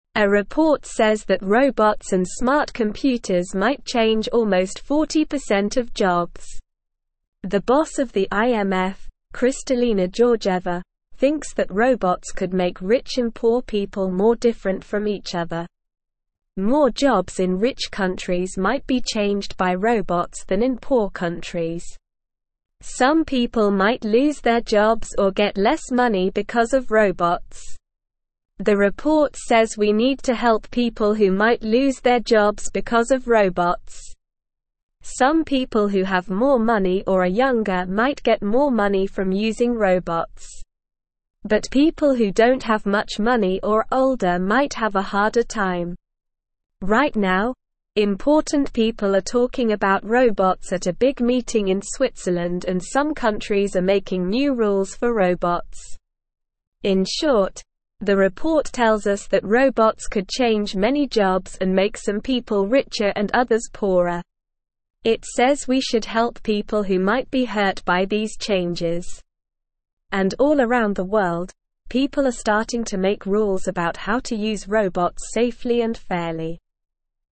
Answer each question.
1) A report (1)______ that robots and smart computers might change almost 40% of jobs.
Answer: says

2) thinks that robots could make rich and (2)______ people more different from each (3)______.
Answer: poor

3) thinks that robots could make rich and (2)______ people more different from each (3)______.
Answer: other

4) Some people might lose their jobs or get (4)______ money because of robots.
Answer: less

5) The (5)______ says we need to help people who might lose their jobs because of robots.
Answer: report

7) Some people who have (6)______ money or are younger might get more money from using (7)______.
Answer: robots

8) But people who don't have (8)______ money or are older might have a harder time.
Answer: much

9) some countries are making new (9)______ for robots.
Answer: rules

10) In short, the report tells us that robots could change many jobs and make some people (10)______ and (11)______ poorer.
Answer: richer

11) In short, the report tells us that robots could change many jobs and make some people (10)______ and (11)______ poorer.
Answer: others

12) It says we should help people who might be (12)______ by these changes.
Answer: hurt

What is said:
A report says that robots and smart computers might change almost 40% of jobs. The boss of the IMF, Kristalina Georgieva, thinks that robots could make rich and poor people more different from each other. More jobs in rich countries might be changed by robots than in poor countries. Some people might lose their jobs or get less money because of robots.
The report says we need to help people who might lose their jobs because of robots. Some people who have more money or are younger might get more money from using robots. But people who don't have much money or are older might have a harder time. Right now, important people are talking about robots at a big meeting in Switzerland and some countries are making new rules for robots.
In short, the report tells us that robots could change many jobs and make some people richer and others poorer. It says we should help people who might be hurt by these changes. And all around the world, people are starting to make rules about how to use robots safely and fairly.

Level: Level 2